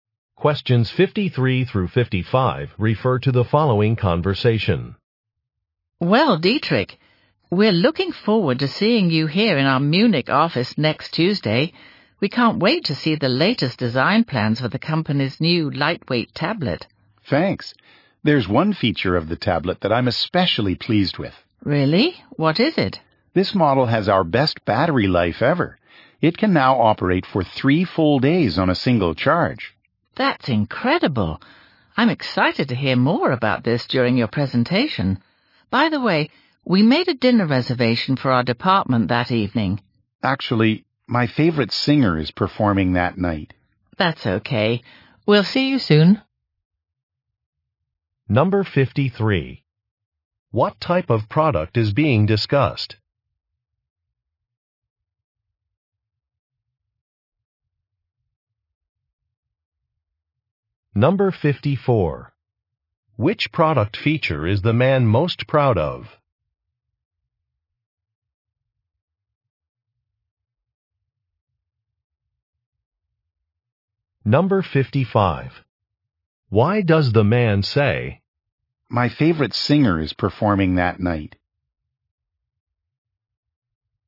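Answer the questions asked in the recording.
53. A tablet
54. Battery life
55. To decline the dinner invitation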